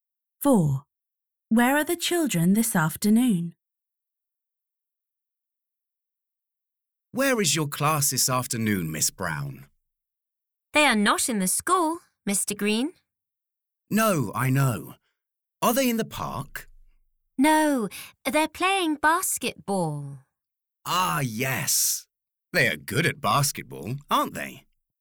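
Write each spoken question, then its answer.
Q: Where are the children this afternoon?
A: playing basketball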